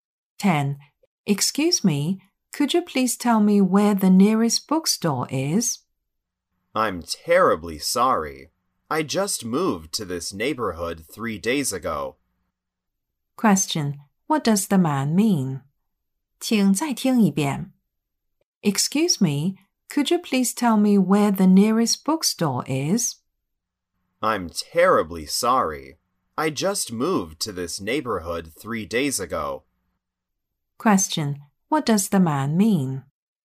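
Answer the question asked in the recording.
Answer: He doesn't know where the nearest bookstore is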